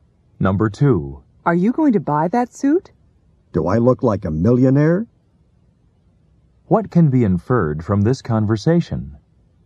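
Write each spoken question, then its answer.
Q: What can be inferred from this conversation?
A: The suit is too expensive for the speaker to buy.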